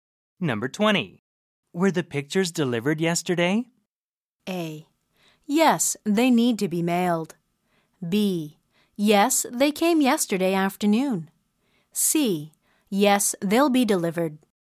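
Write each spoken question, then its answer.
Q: Were the pictures delivered yesterday?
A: B: Yes, they came yesterday afternoon.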